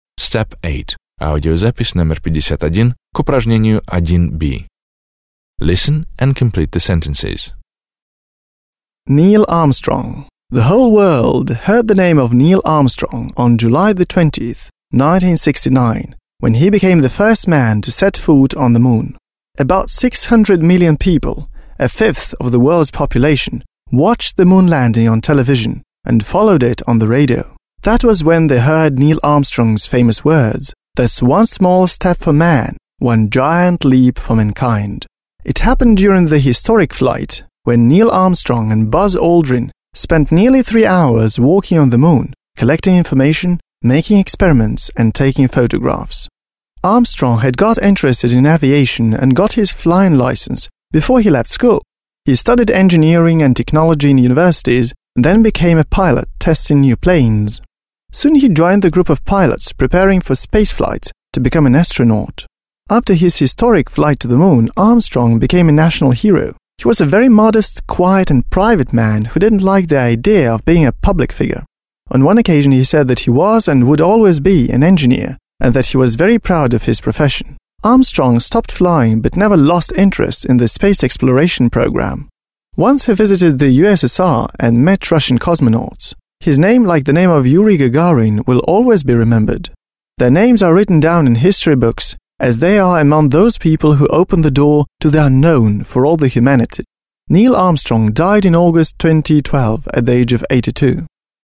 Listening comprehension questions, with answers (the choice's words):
B. Listen to the text, (51), and complete the following sentences.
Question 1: The world heard about Neil Armstrong when he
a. flew into space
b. flew to the Moon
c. stepped on the Moon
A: stepped on the Moon

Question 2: Neil Armstrong explored the surface of the Moon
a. alone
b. together with another astronaut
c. together with two more astronauts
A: together with another astronaut

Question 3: Armstrong was educated to be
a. an astronaut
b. a pilot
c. an engineer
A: an engineer

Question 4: Armstrong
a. enjoyed his popularity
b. did not like to be in the focus of public attention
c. did a lot for the American space exploration programme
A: did not like to be in the focus of public attention

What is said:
The whole world heard the name of Neil Armstrong on the 20th of July, 1969, when he became the first man to set foot on the Moon. About 600 million people − a fifth of the world's population − watched the moon landing on television and followed it on the radio. That was when they heard Neil Armstrong's famous words: «That's one small step for man, one giant leap for mankind.»
It happened during the historic flight when Neil Armstrong and Buzz Aldrin spent nearly three hours walking on the Moon, collecting information, doing experiments and taking photographs.
Armstrong had got interested in aviation and got his flying license before he left school. He studied engineering and technology in universities and then became a pilot testing new planes.
Soon he joined a group of pilots preparing for space flights to become an astronaut.
After his historic flight to the Moon Armstrong became a national hero. He was a very modest, quiet and private man who didn't like the idea of being a public figure. On one occasion he said that he was and would always be an engineer and that he was very proud of his profession. Armstrong stopped flying but never lost interest in the space exploration programme. Once he visited the USSR and met Russian cosmonauts. His name, like the name of Yuri Gagarin, will always be remembered.
Their names are written down in history books as they are among those people who opened the door to the unknown for all the humanity.
Neil Armstrong died in August 2012 at the age of 82.

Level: 9 класс